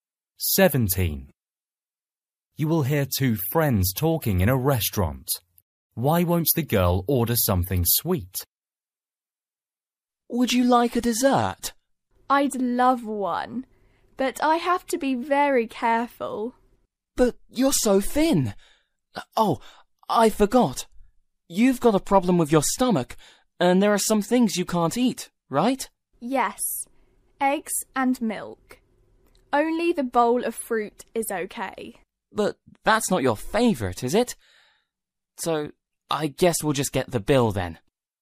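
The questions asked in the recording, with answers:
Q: Why won't the girl order something sweet?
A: She has a stomach problem and can't eat eggs or milk; the only dessert she can have is fruit, which isn't her favourite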